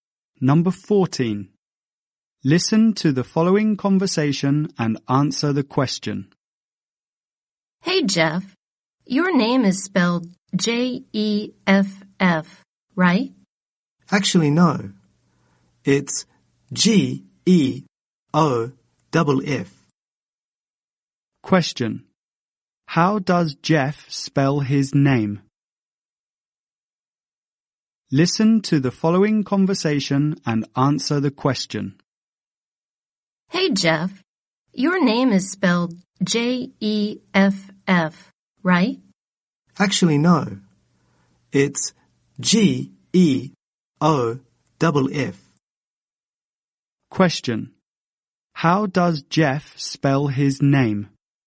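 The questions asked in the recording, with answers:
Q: How does Jeff spell his name?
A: G-E-O-F-F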